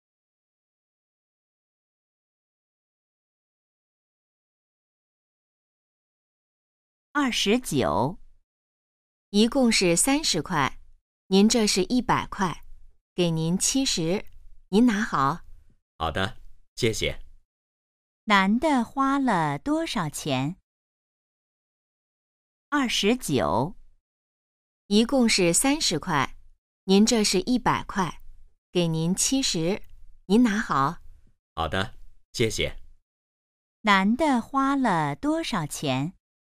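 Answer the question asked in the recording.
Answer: 30块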